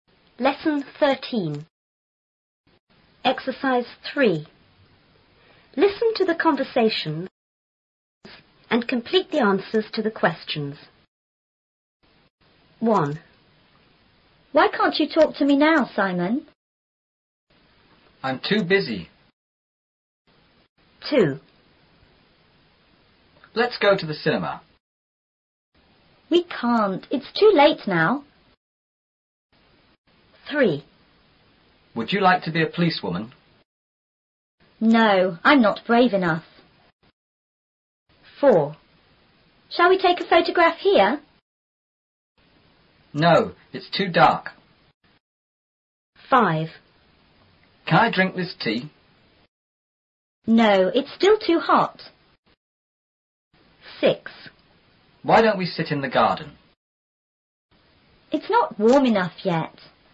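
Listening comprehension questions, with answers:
3.Listen to the conversations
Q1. He is_____talk to the woman now.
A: too busy to

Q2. It is_____go to the cinema now.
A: too late to

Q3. She is_____be a policewoman.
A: not brave enough to

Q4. It is_____take a photograph.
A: too dark to

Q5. The tea is_____drink.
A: too hot to

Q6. It is_____sit in the garden yet.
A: not warm enough to

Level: 初中英语广州版4B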